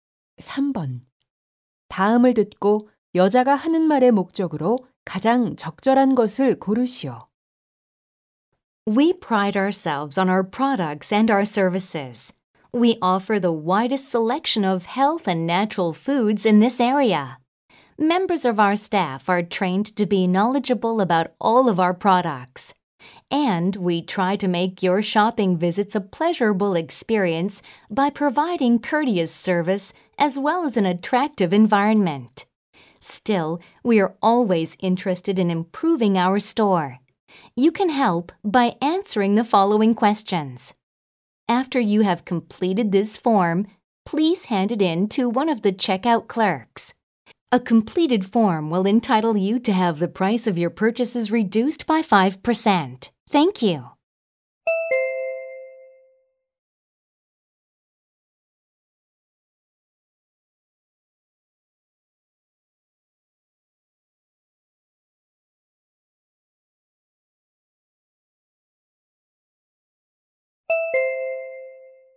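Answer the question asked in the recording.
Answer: 매장 개선을 위한 설문 작성 요청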